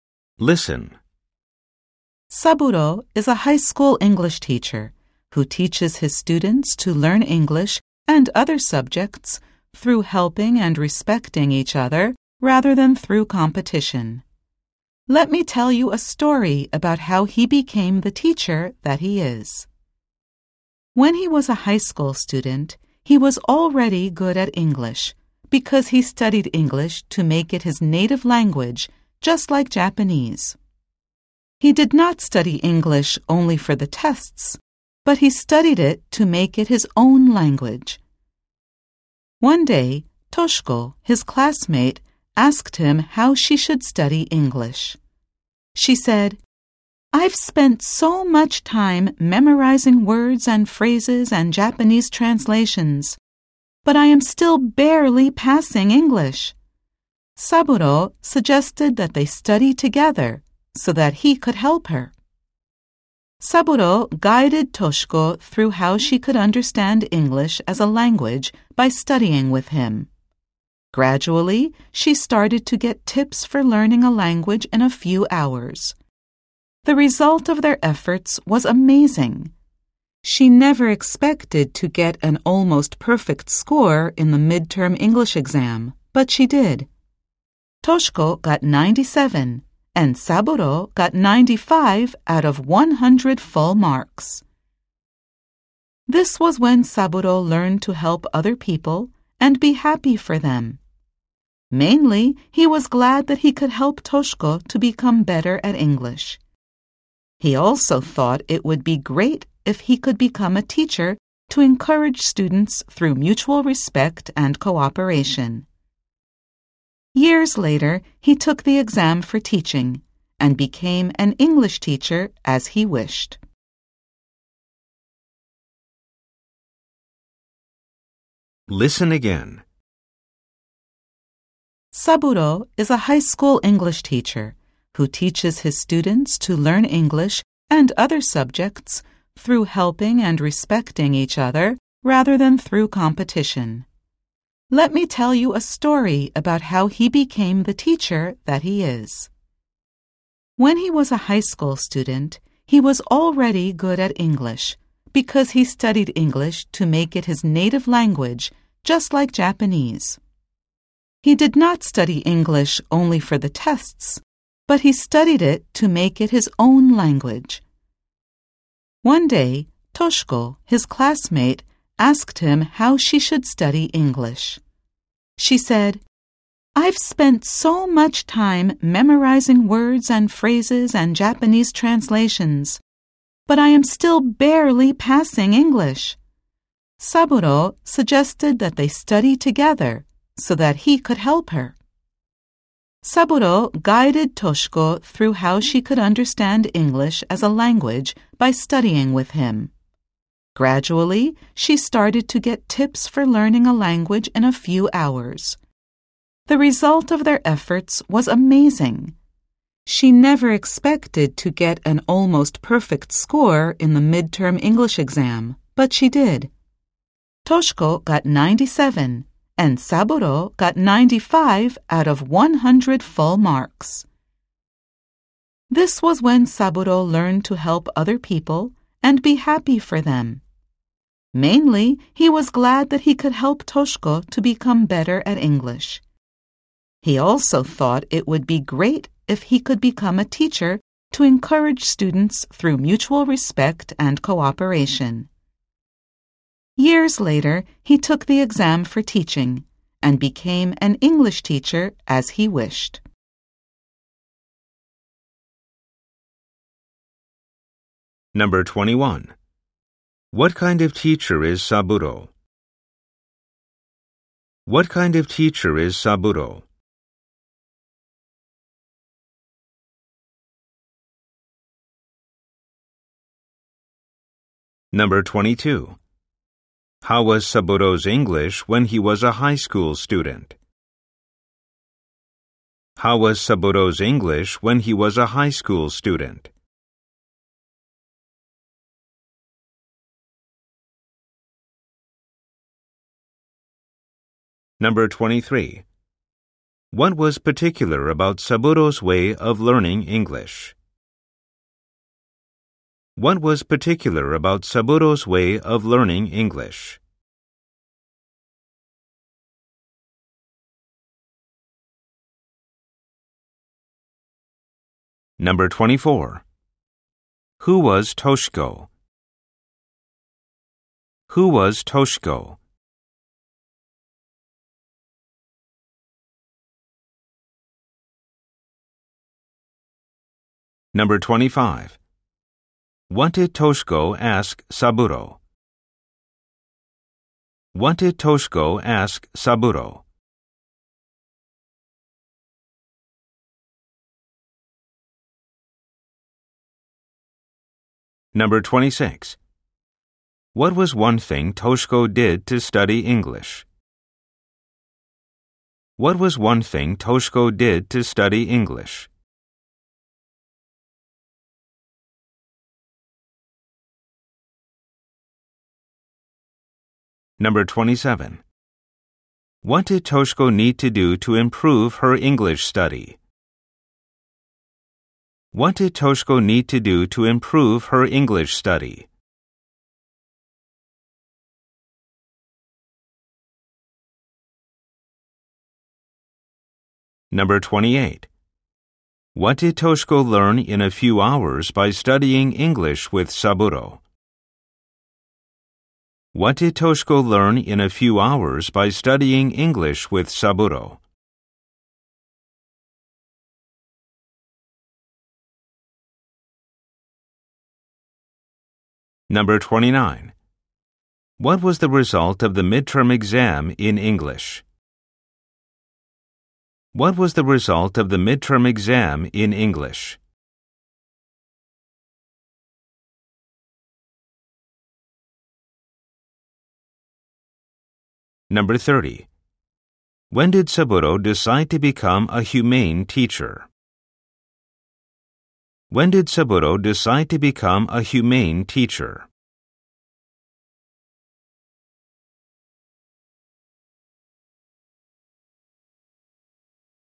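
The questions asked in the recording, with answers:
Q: What kind of teacher is Saburo?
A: A high school English teacher who teaches through helping and respecting each other rather than competition

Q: How was Saburo's English when he was a high school student?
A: He was already good at English

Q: What was particular about Saburo's way of learning English?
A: He studied it to make it his own language, like Japanese, not only for tests

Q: Who was Toshiko?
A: Saburo's classmate

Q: What did Toshiko ask Saburo?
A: How she should study English

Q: What was one thing Toshiko did to study English?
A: She memorized words, phrases and Japanese translations

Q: What did Toshiko learn in a few hours by studying English with Saburo?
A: Tips for learning a language

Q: What was the result of the midterm exam in English?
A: Toshiko got 97 and Saburo got 95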